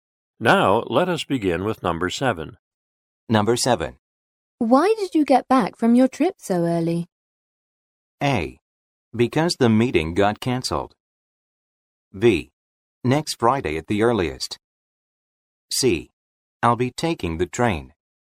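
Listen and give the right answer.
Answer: A: Because the meeting got cancelled.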